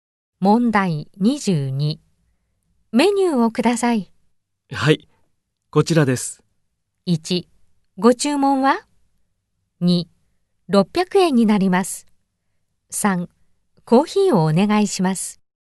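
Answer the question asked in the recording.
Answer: 3: コーヒーをお願いします。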